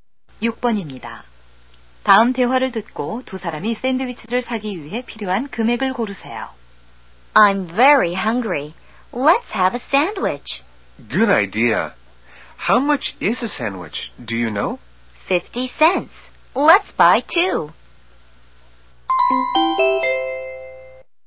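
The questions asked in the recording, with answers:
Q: 다음 대화를 듣고 두 사람이 샌드위치를 사기 위해 필요한 금액을 고르세요.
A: 1달러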